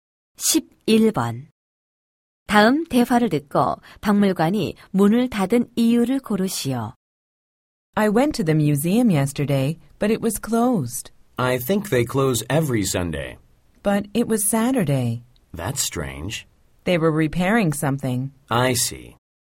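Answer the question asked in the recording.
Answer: 수리 중이어서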